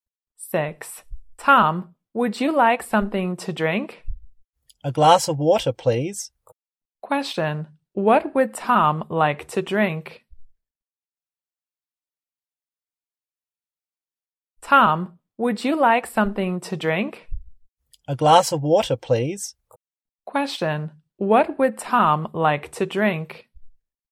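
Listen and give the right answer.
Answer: A glass of water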